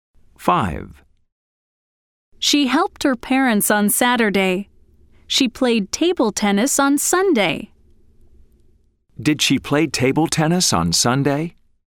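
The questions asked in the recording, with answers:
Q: Did she play table tennis on Sunday?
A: Yes, she did.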